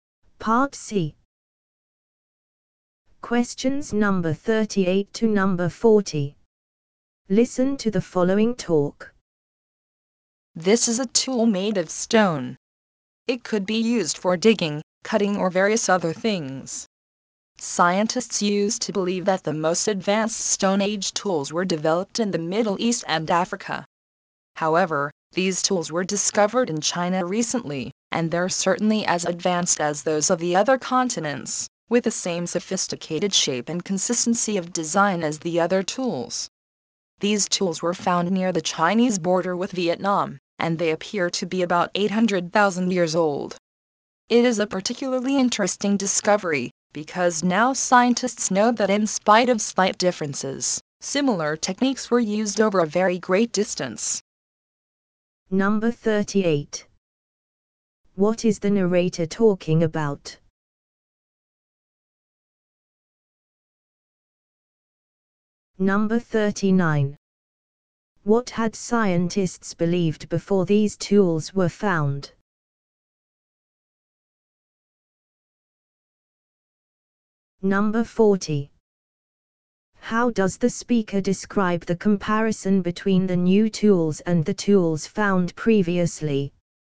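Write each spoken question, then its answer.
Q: What is the narrator talking about?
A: Advanced Stone Age tools found in China.

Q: What had scientists believed before these tools were found?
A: That the most advanced Stone Age tools were developed in the Middle East and Africa.

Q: How does the speaker describe the comparison between the new tools and the tools found previously?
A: They are just as advanced, with the same shape and design.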